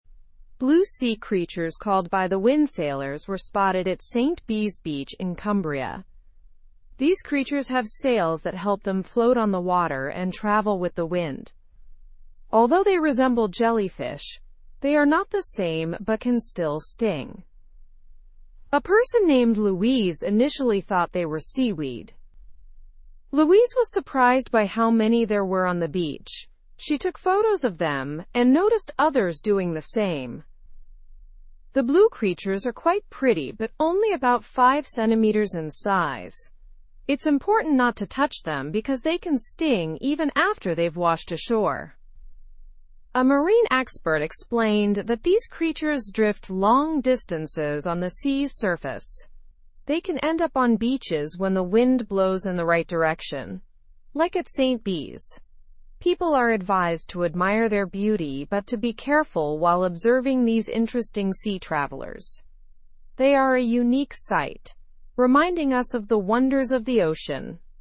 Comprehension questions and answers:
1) Where were the by-the-wind sailors found?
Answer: They were found at St Bees beach in Cumbria.

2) What do the by-the-wind sailors use to move on the water?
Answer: They use sails to move on the water.

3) How did Louise first react to seeing the creatures?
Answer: She thought they were seaweed at first.

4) How big are the by-the-wind sailors?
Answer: They are about 5 cm in size.

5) Why should people avoid touching the by-the-wind sailors?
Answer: Because they can still sting even after washing ashore.

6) Who provided information about the creatures on the beach?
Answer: A marine expert provided the information.

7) What condition allows these creatures to end up on beaches?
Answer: The right wind direction helps them end up on beaches.

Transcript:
Blue sea creatures called by-the-wind sailors were spotted at St Bees beach in Cumbria. These creatures have sails that help them float on the water and travel with the wind. Although they resemble jellyfish, they are not the same but can still sting. A person named Louise initially thought they were seaweed.
Louise was surprised by how many there were on the beach. She took photos of them and noticed others doing the same. The blue creatures are quite pretty but only about 5 cm in size. It's important not to touch them because they can sting even after they've washed ashore.
A marine expert explained that these creatures drift long distances on the sea's surface. They can end up on beaches when the wind blows in the right direction, like at St Bees. People are advised to admire their beauty but to be careful while observing these interesting sea travelers. They are a unique sight, reminding us of the wonders of the ocean.

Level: Level 2